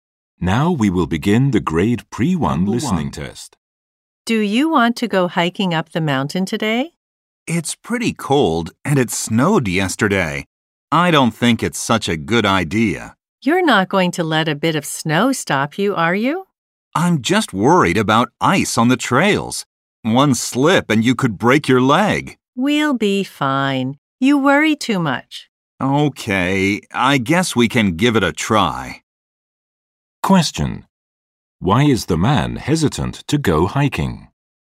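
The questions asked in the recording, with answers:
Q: Why is the man hesitant to go hiking?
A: He is worried about ice on the trails and that someone could slip and get hurt.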